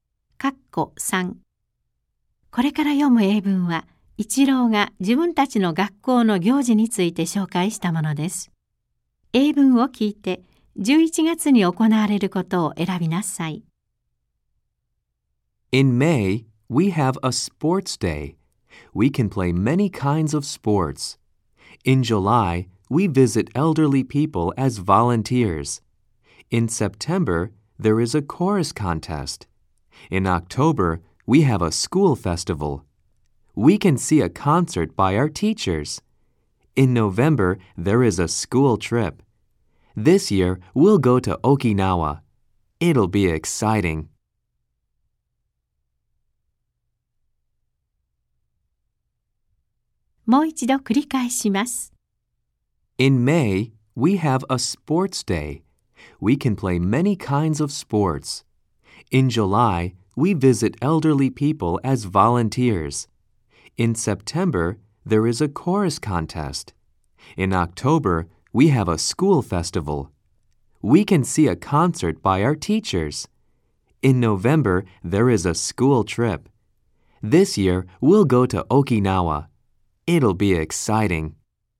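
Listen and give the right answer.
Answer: 修学旅行(沖縄)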